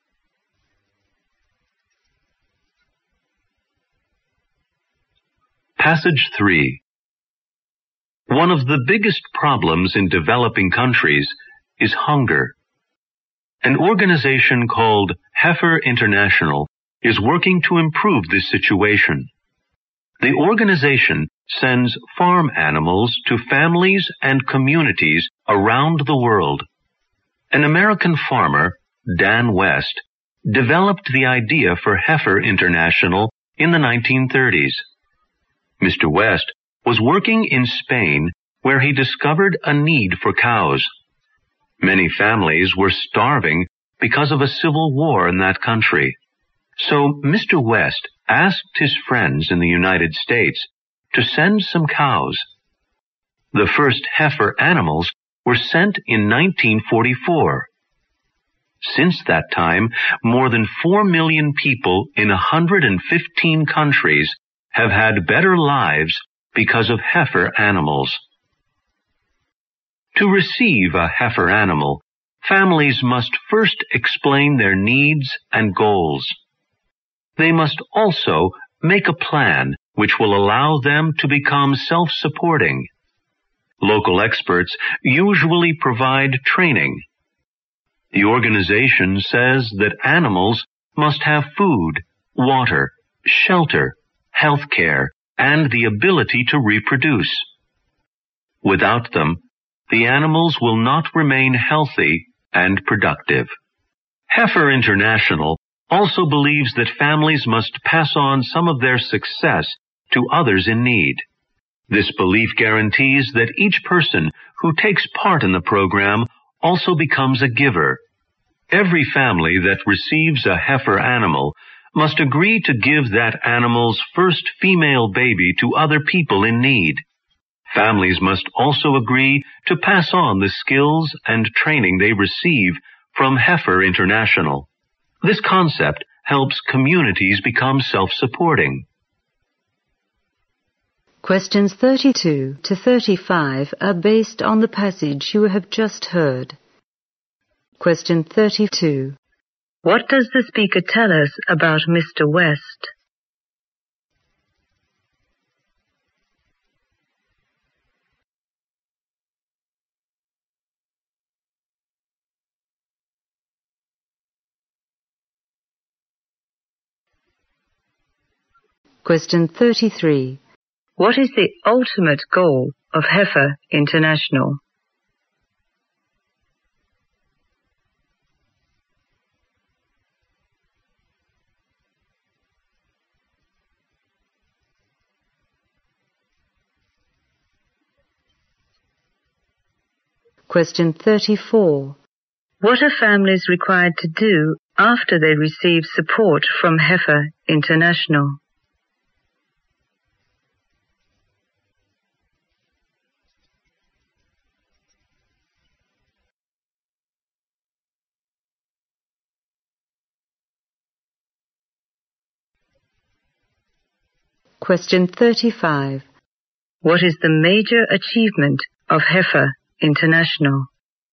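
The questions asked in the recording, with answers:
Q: What does the speaker tell us about Mr. West?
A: He was an American farmer who developed the idea for Heifer International after seeing starving families in Spain.

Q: What is the ultimate goal of Heifer International?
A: To help families and communities become self-supporting.

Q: What are families required to do after they receive support from Heifer International?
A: Give the animal's first female baby to others in need and pass on their skills and training.

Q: What is the major achievement of Heifer International?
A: It has given more than 4 million people in 115 countries better lives.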